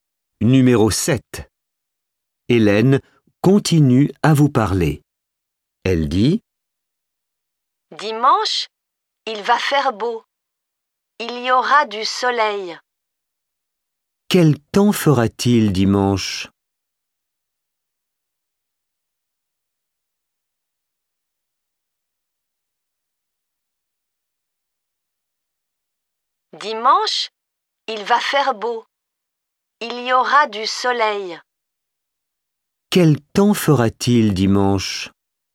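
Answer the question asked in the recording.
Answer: Il fera beau, avec du soleil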